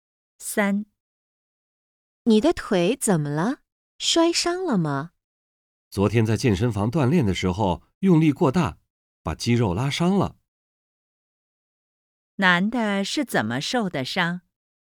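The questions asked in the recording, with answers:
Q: 男的是怎么受的伤?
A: 在健身房锻炼时用力过大,把肌肉拉伤了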